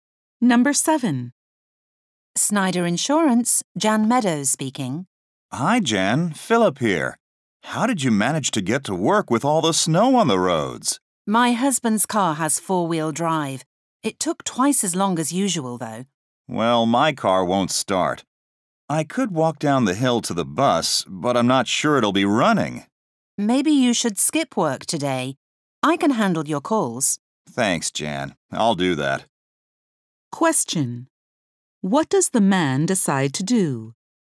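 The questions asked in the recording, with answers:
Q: What does the man decide to do?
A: Skip work today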